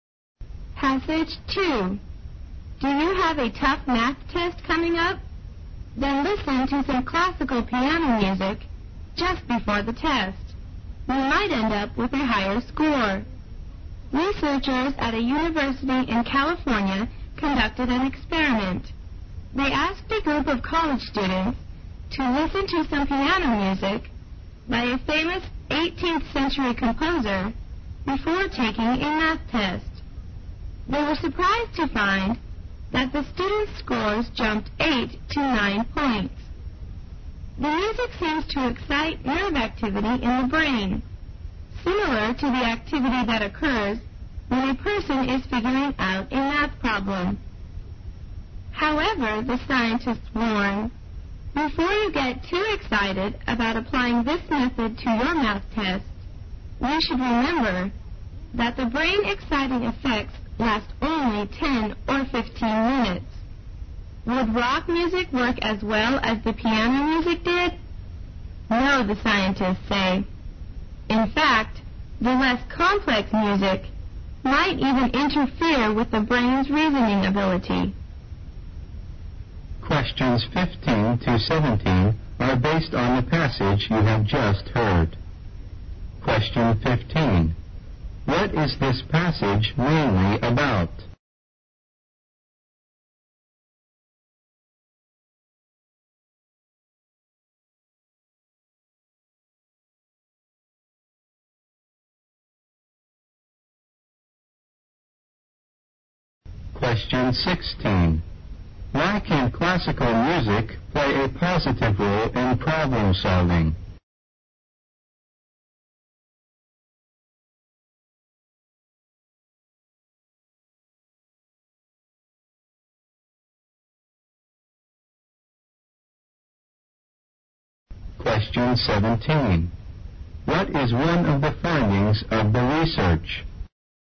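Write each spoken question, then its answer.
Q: What is this passage mainly about?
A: How classical piano music can improve math test scores.

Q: Why can classical music play a positive role in problem solving?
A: It excites nerve activity in the brain similar to the activity when solving math problems.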